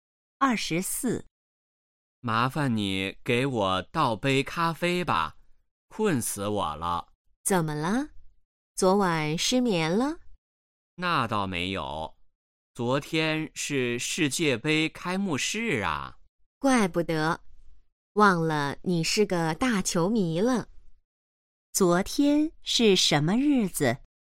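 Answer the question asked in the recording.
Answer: 世界杯开幕式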